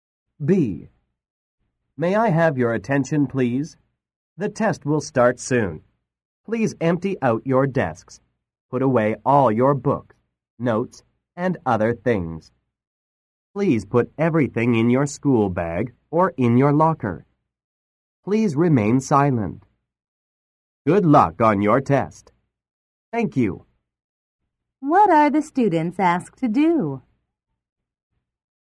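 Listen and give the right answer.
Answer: Empty their desks, put everything away, and stay silent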